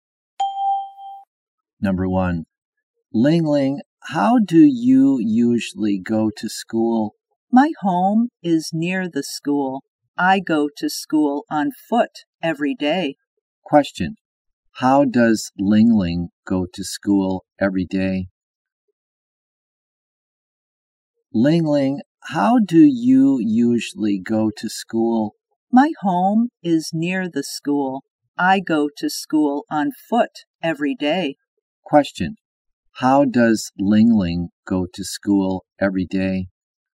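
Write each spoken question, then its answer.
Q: How does Ling Ling go to school every day?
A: On foot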